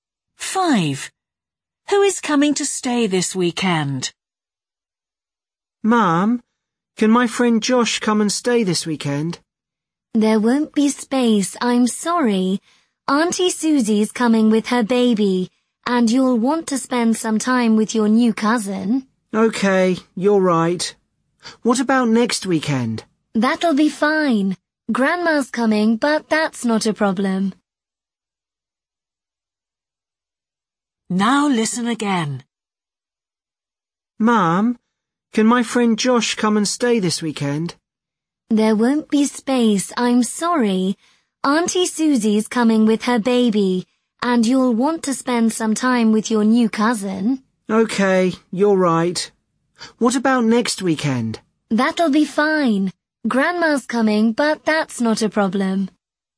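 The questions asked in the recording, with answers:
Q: Who is coming to stay this weekend?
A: Auntie Susie and her baby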